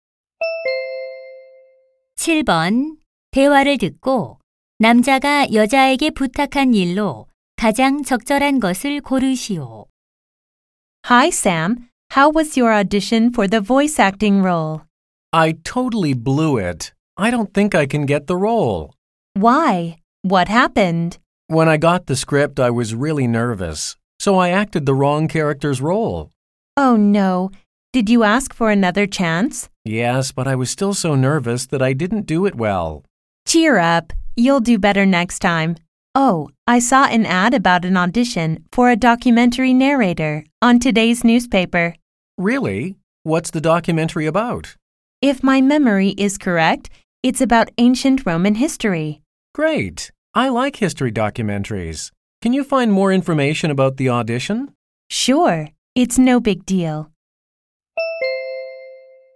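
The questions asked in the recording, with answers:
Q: 대화를 듣고 남자가 여자에게 부탁한 일로 가장 적절한 것을 고르시오.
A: 다큐멘터리 내레이터 오디션 정보 찾아 주기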